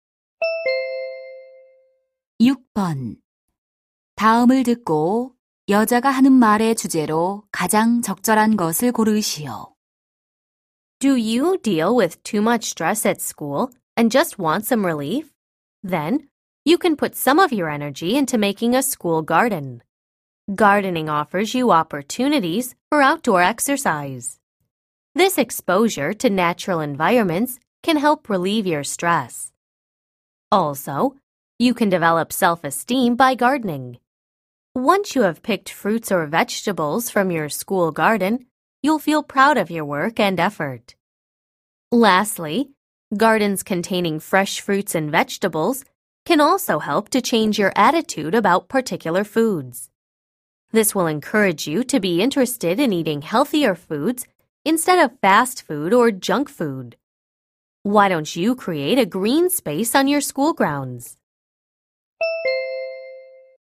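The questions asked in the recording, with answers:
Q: 다음을 듣고 여자가 하는 말의 주제로 가장 적절한 것을 고르시오.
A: 학교 정원 가꾸기의 이점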